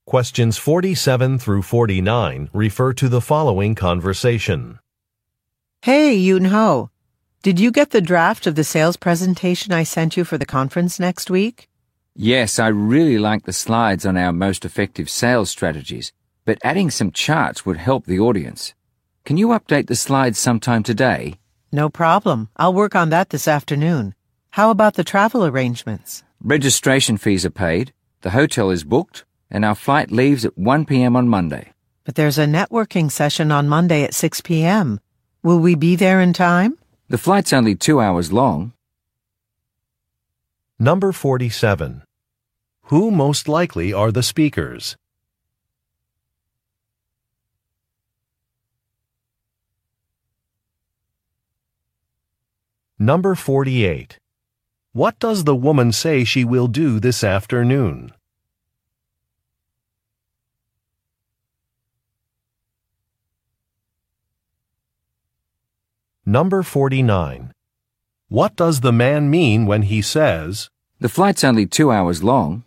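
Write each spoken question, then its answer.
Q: What does the woman say she will do this afternoon?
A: Add charts to the presentation slides

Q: What does the man mean when he says, "The flight's only 2 hours long"?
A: They will arrive in time for the networking session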